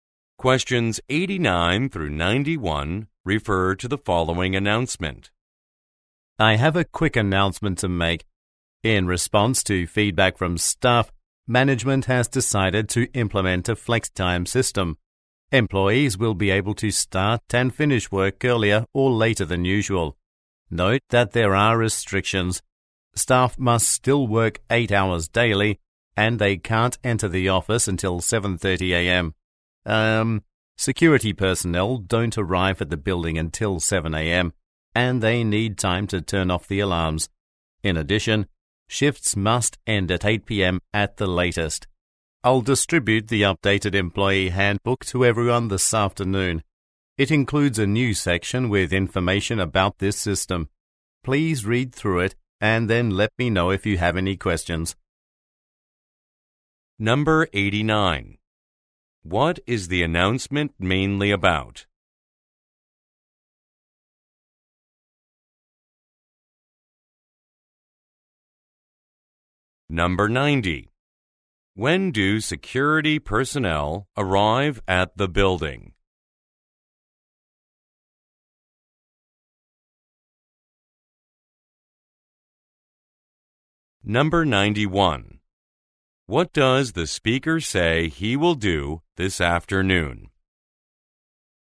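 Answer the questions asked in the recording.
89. A new flex time system
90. At 7 a.m.
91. Distribute the updated employee handbook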